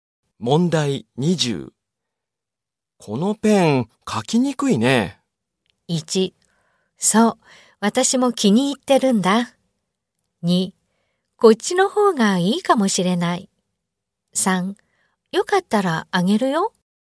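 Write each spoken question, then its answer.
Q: このペン、書きにくいね。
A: 2: こっちの方がいいかもしれない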